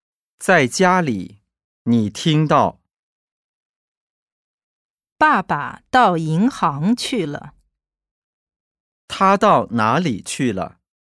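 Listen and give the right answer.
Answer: 银行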